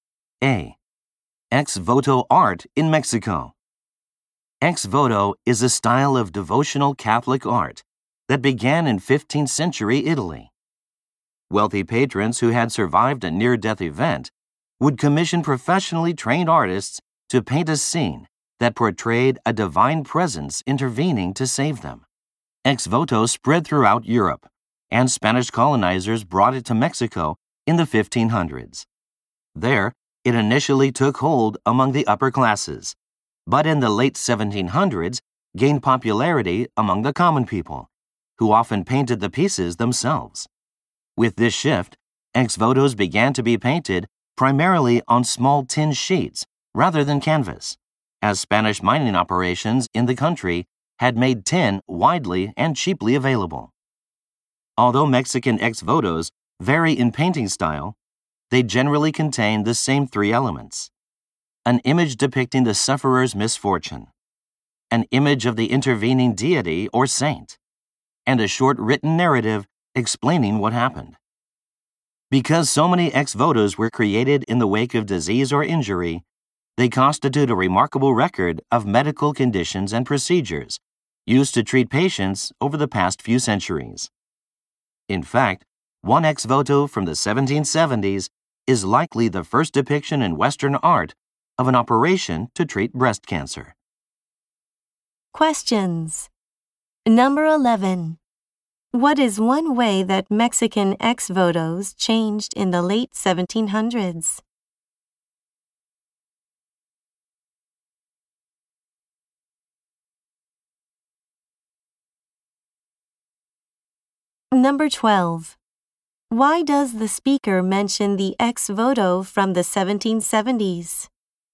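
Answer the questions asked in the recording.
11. They began to be painted mainly on small tin sheets by common people rather than on canvas.
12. To show that ex votos are a valuable record of medical history; it is likely the first Western depiction of breast cancer surgery.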